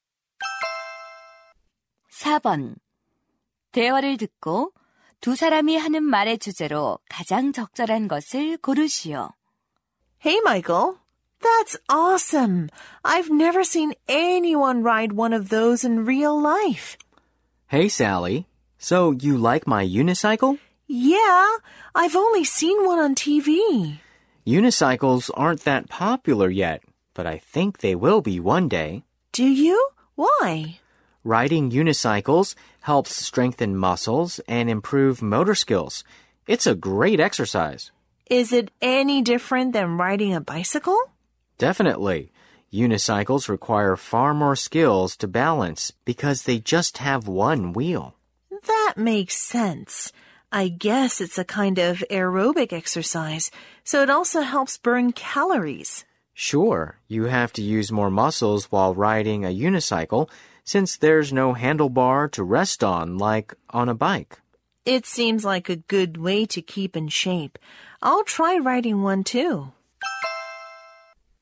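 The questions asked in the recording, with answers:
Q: 대화를 듣고 두 사람이 하는 말의 주제로 가장 적절한 것을 고르시오.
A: 외발자전거 타기의 운동 효과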